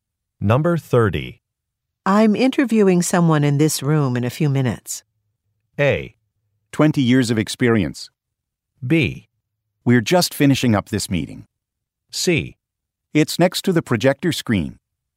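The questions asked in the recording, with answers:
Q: I'm interviewing someone in this room in a few minutes.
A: B: We're just finishing up this meeting.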